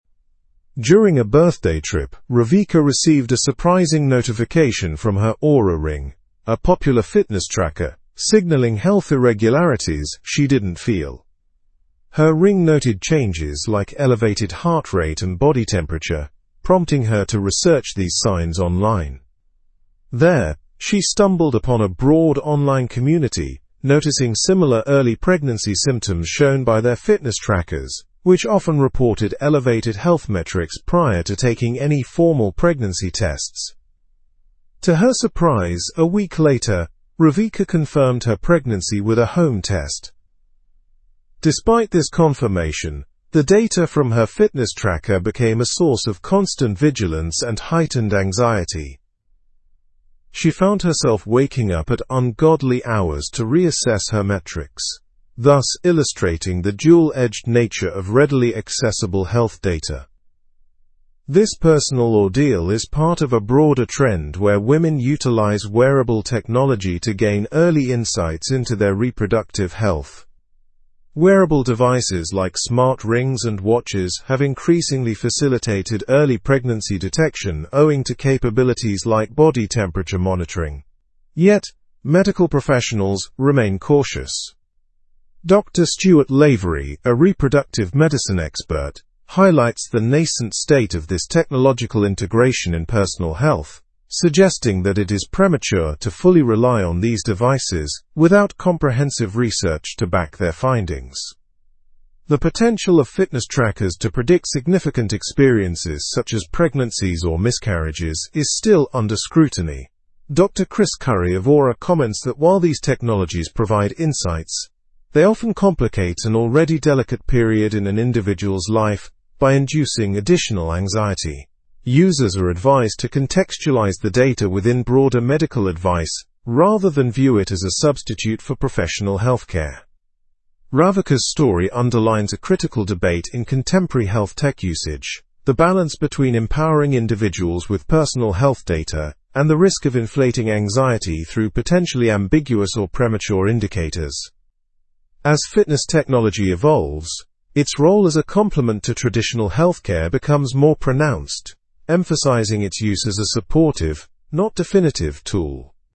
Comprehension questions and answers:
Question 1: What alerted Ravika to possible health changes?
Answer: Her Oura ring notification.

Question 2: How did online communities help Ravika understand her symptoms?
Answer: By sharing similar experiences with wearable devices.

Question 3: What subsequent action did Ravika take after her ring's notification?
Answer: She took a home pregnancy test.

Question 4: How did the fitness tracker data affect Ravika's daily routine?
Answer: It caused her anxiety and disrupted her sleep.

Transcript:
During a birthday trip, Ravika received a surprising notification from her Oura ring, a popular fitness tracker, signaling health irregularities she didn't feel. Her ring noted changes like elevated heart rate and body temperature, prompting her to research these signs online. There, she stumbled upon a broad online community noticing similar early pregnancy symptoms shown by their fitness trackers, which often reported elevated health metrics prior to taking any formal pregnancy tests.
To her surprise, a week later, Ravika confirmed her pregnancy with a home test. Despite this confirmation, the data from her fitness tracker became a source of constant vigilance and heightened anxiety. She found herself waking up at ungodly hours to reassess her metrics, thus illustrating the dual-edged nature of readily accessible health data. This personal ordeal is part of a broader trend where women utilize wearable technology to gain early insights into their reproductive health.
Wearable devices like smart rings and watches have increasingly facilitated early pregnancy detection owing to capabilities like body temperature monitoring. Yet, medical professionals remain cautious. Dr. Stuart Lavery, a reproductive medicine expert, highlights the nascent state of this technological integration in personal health, suggesting that it is premature to fully rely on these devices without comprehensive research to back their findings.
The potential of fitness trackers to predict significant experiences, such as pregnancies or miscarriages, is still under scrutiny. Dr. Chris Curry of Oura comments that while these technologies provide insights, they often complicate an already delicate period in an individual's life by inducing additional anxiety. Users are advised to contextualize the data within broader medical advice rather than view it as a substitute for professional healthcare.
Ravika's story underlines a critical debate in contemporary health tech usage: the balance between empowering individuals with personal health data and the risk of inflating anxiety through potentially ambiguous or premature indicators.
health data and the risk of inflating anxiety through potentially ambiguous or premature ?. As fitness technology evolves, its role as a complement to traditional healthcare becomes more pronounced, emphasizing its use as a supportive, not definitive, tool.

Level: Level 4